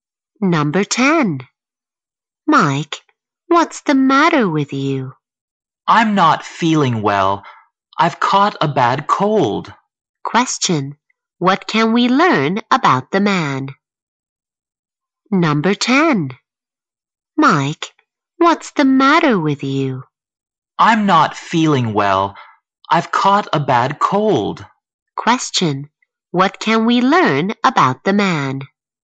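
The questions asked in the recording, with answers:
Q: What can we learn about the man?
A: He has caught a bad cold.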